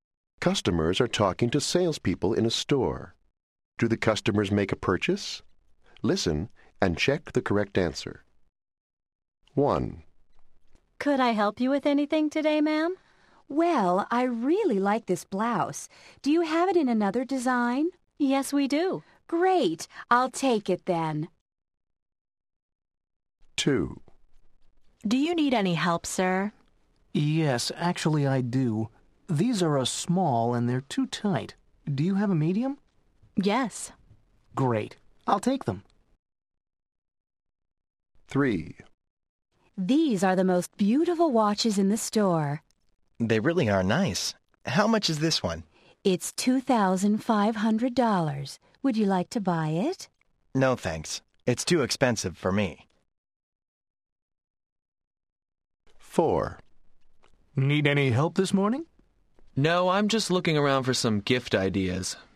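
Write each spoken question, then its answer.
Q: Do the customers make a purchase?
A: Yes

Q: Do the customers make a purchase?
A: Yes

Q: Do the customers make a purchase?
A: No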